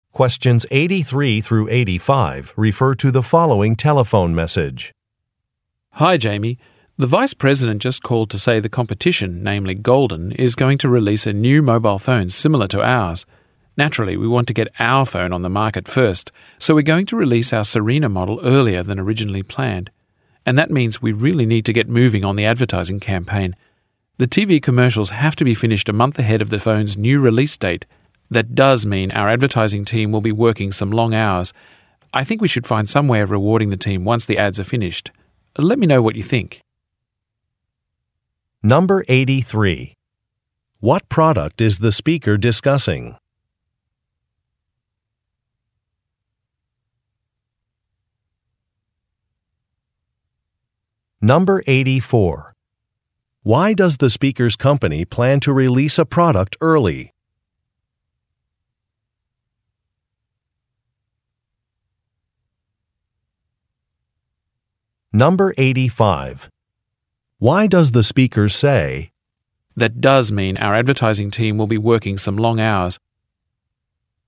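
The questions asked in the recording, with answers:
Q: What product is the speaker discussing?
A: A mobile phone

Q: Why does the speaker's company plan to release a product early?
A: To get it on the market before a competitor's similar phone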